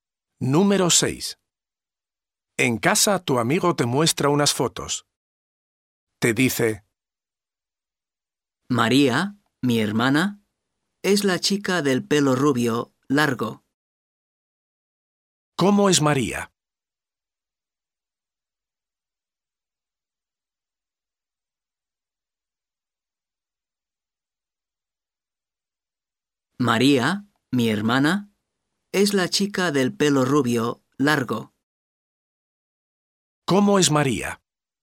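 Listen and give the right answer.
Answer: Tiene el pelo rubio y largo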